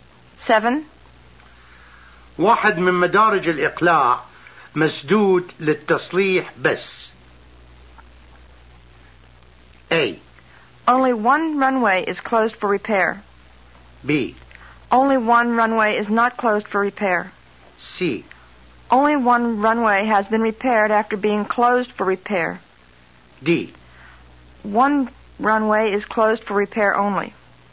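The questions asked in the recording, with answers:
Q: واحد من مدارج الإقلاع مسدود للتصليح بس.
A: A: Only one runway is closed for repair.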